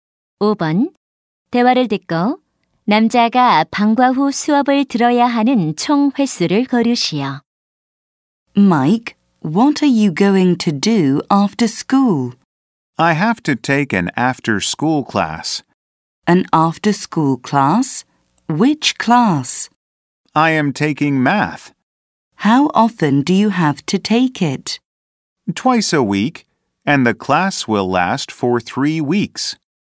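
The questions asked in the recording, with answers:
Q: 대화를 듣고 남자가 방과 후 수업을 들어야 하는 총 횟수를 고르시오.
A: 6번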